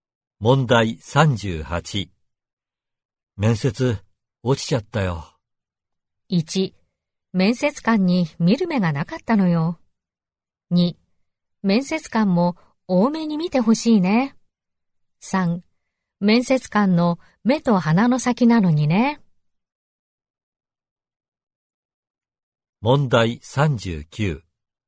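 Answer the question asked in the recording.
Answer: 1: 面接官に見る目がなかったのよ。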